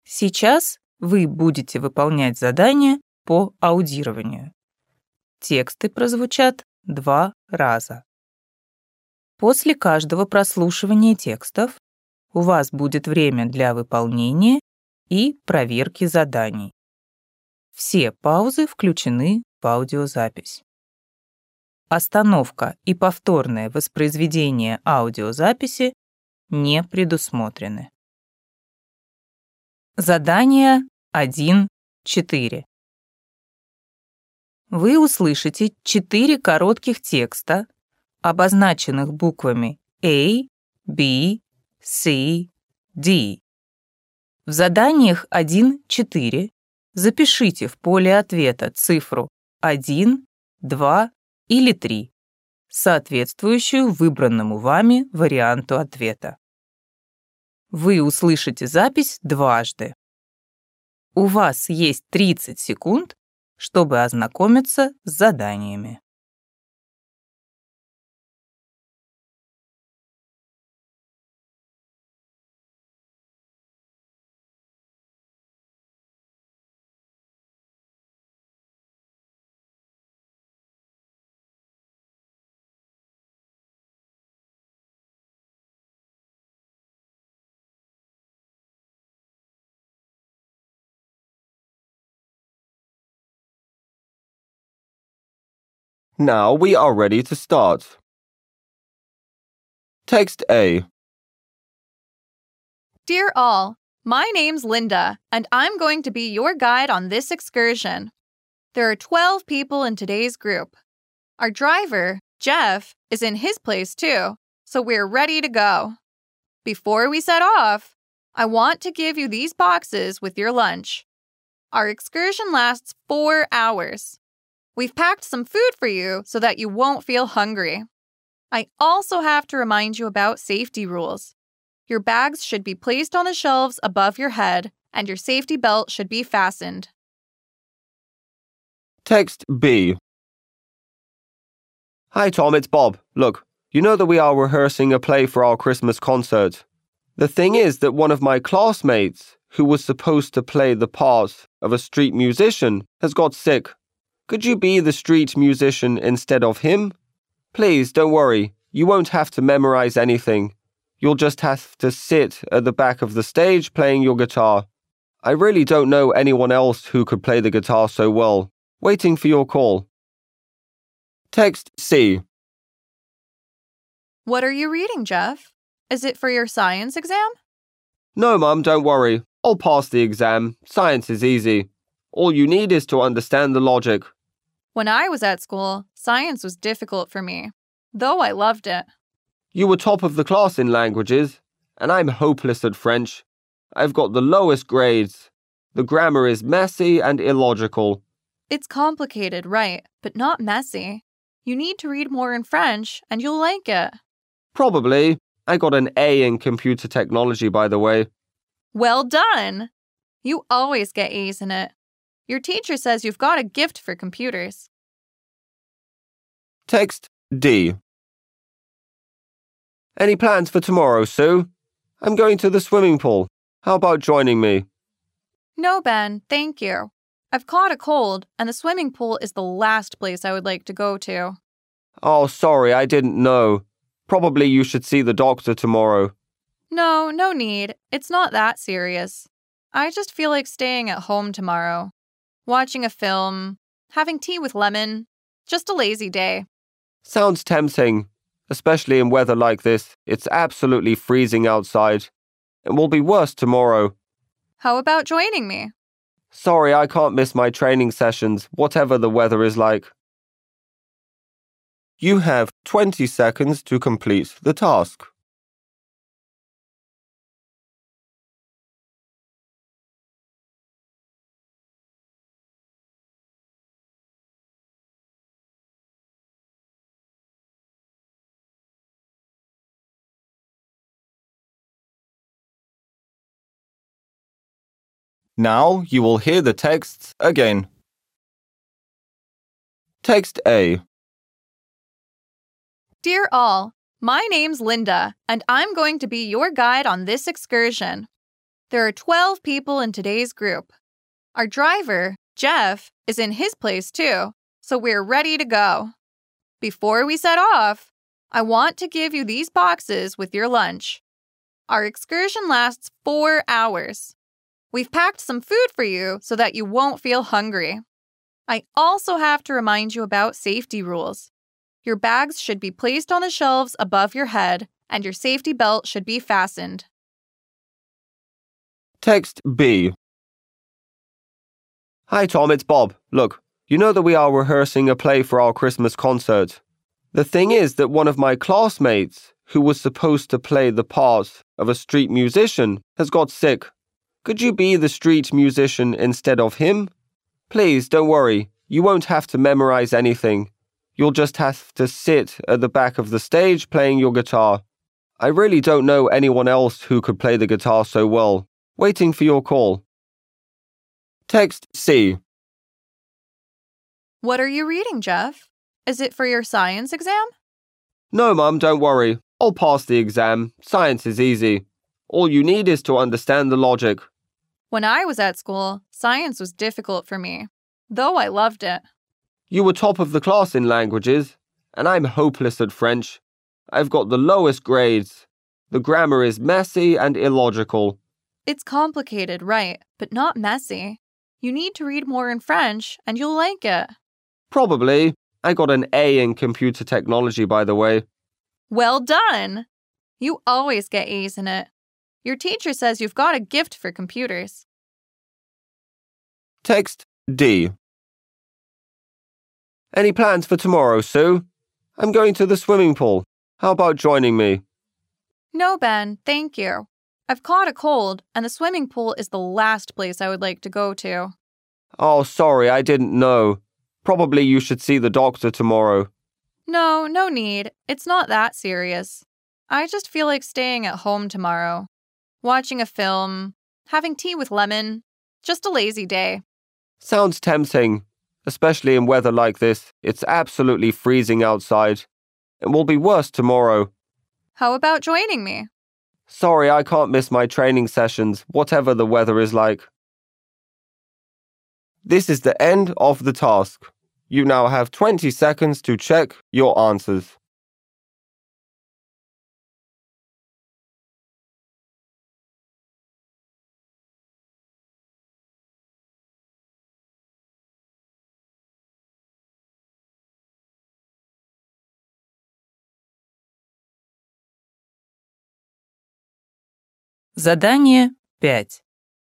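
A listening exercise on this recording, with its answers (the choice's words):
Вы услышите четыре коротких текста, обозначенных буквами А, B, C, D.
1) The excursion guide asks the tourists to ...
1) collect their bags from the bus.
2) take their lunch boxes.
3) board the bus.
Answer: take their lunch boxes.

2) Bob wants Tom to ...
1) invite him to the musical show.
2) lend him his guitar for a while.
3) take part in the school performance.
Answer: take part in the school performance.

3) What school subject does Jeff find most difficult?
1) Science.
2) French.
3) Computer Studies.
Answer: French.

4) Tomorrow, Sue is going to ...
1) relax at home.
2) go to the swimming pool.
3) visit a doctor.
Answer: relax at home.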